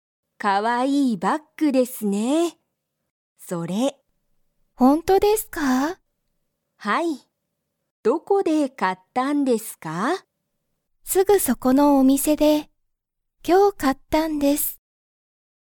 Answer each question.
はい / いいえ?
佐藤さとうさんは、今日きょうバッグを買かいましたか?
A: はい